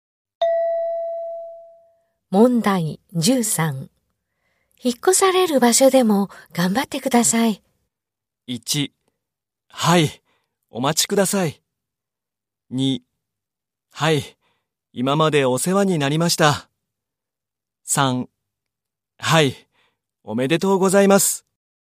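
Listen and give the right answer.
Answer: 2: はい、今までお世話になりました。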